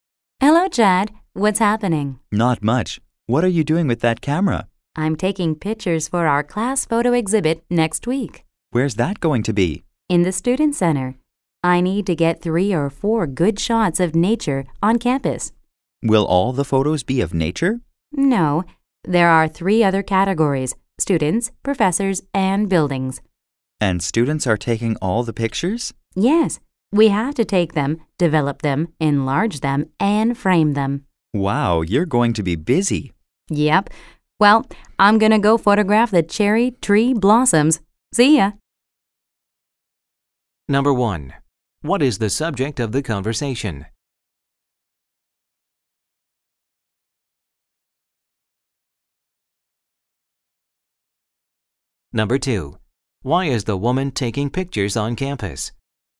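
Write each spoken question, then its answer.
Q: What is the subject of the conversation?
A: A class photo exhibit

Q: Why is the woman taking pictures on campus?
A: For her class photo exhibit next week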